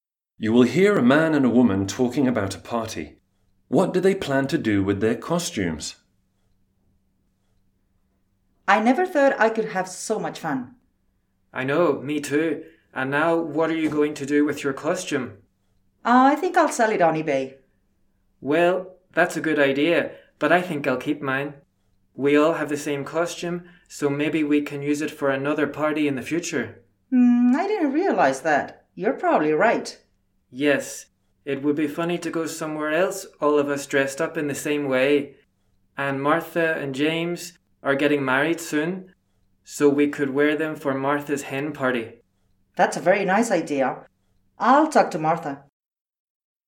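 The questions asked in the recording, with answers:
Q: What do they plan to do with their costumes?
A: Keep them and wear them again at another party (Martha's hen party)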